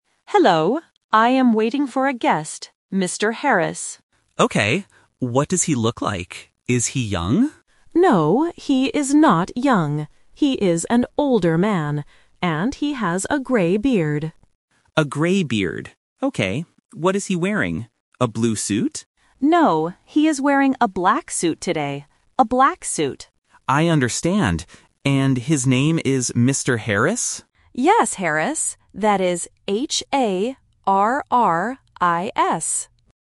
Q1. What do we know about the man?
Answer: He is old.

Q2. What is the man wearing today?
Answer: A black suit

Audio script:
Assistant: Hello. I am waiting for a guest, Mr. Harris.
Receptionist: Okay. What does he look like? Is he young?
Assistant: No, he is not young. He is an older man. And he has a grey beard.
Receptionist: A grey beard. Okay. What is he wearing? A blue suit?
Assistant: No, he is wearing a black suit today. A black suit.
Receptionist: I understand. And his name is Mr. Harris?